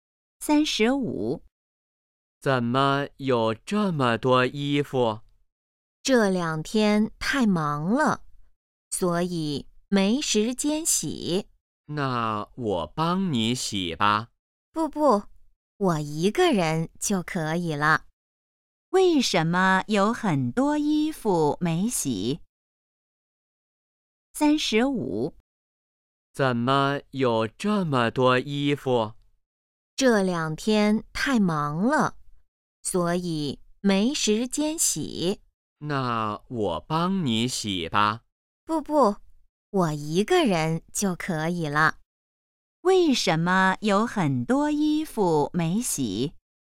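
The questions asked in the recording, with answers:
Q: 为什么有很多衣服没洗?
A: 这两天太忙了,没时间洗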